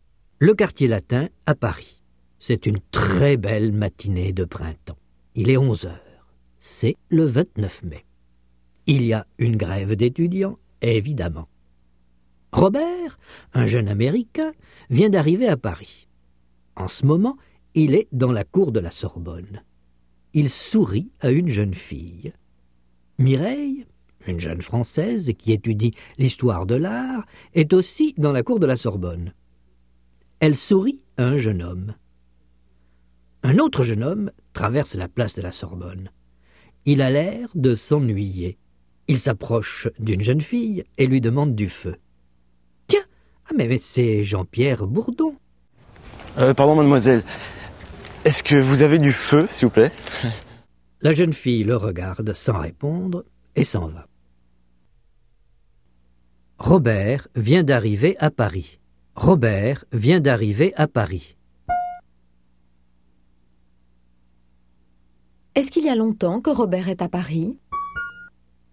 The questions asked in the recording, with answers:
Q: Est-ce qu'il y a longtemps que Robert est à Paris ?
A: Non, il vient d'arriver.